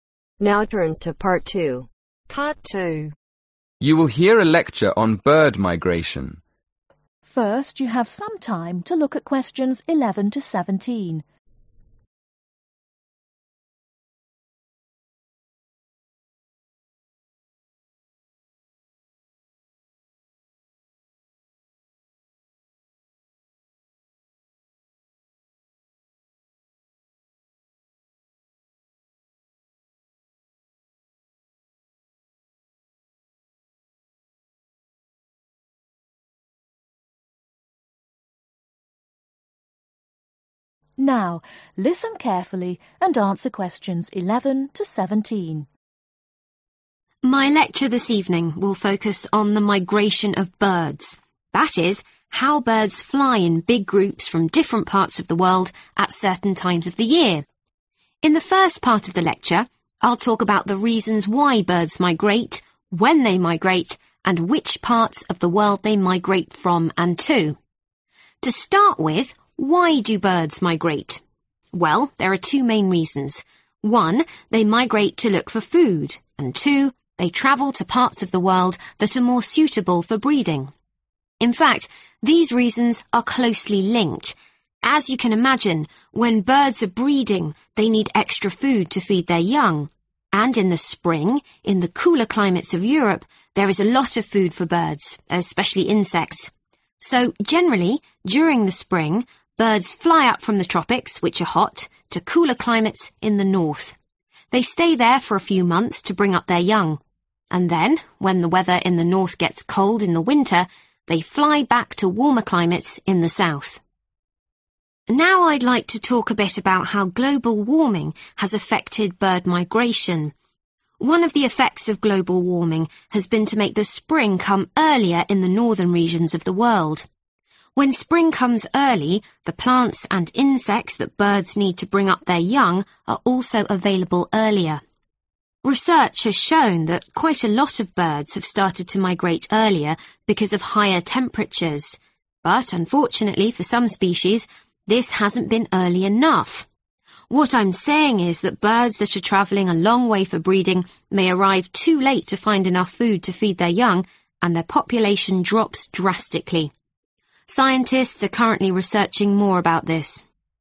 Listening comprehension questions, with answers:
Complete the summary. Write ONE WORD ONLY for each answer.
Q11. Birds migrate for two main reasons: to look for (11)............ and to breed.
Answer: Food

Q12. When they are breeding they need to move to areas where they can (12)............ young in the spring.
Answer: Feed

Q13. They migrate from the (13)............ to cooler countries in the north.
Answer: Tropics

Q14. They spend several months there, flying south again in the winter to warmer (14)............ .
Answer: Climates

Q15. How has global warming affected the arrival of spring ?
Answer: Comes earlier

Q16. Why have birds started to migrate earlier ?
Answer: Higher Temperatures

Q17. What happens to the population of birds that breed late ?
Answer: Drops Drastically